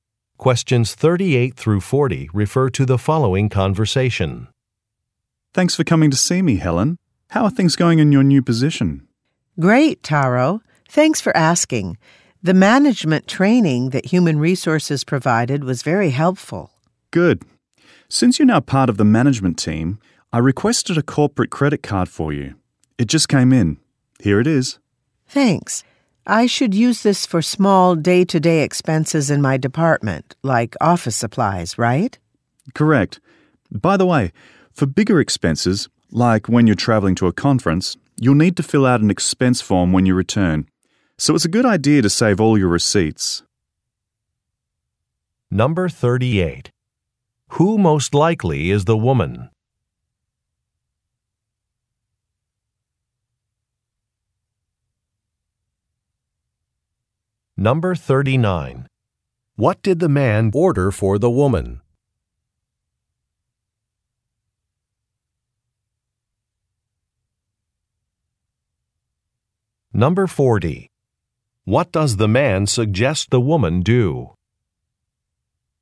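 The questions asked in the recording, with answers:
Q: Who most likely is the woman?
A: A new manager

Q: What did the man order for the woman?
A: A corporate credit card

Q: What does the man suggest the woman do?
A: Save all her receipts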